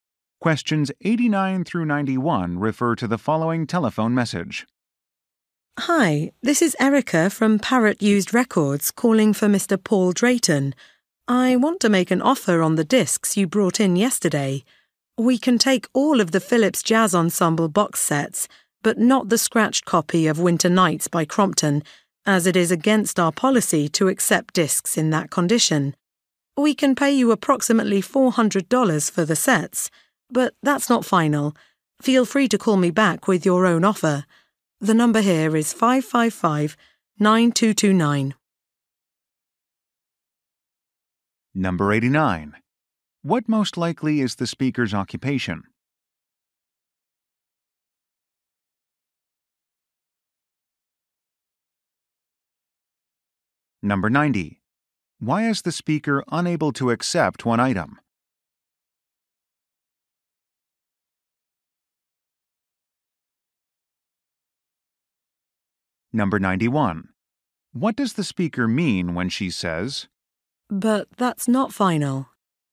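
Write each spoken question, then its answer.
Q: What most likely is the speaker's occupation?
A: Used record store employee

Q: Why is the speaker unable to accept one item?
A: It is scratched

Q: What does the speaker mean when she says,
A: The price is negotiable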